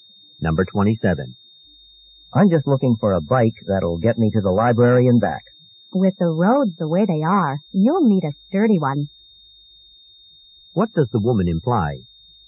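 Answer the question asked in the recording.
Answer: The roads are rough, so he needs a sturdy bike.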